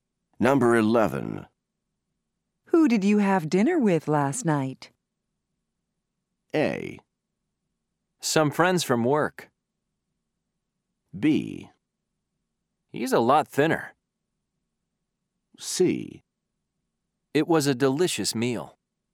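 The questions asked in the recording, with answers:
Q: Who did you have dinner with last night?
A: A: Some friends from work.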